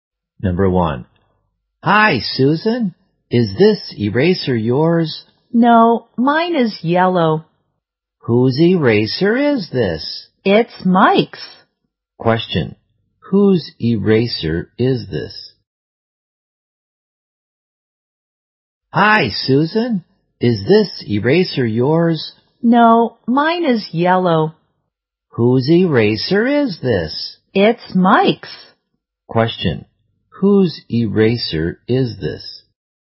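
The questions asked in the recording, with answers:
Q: Question. Whose eraser is this?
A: Mike's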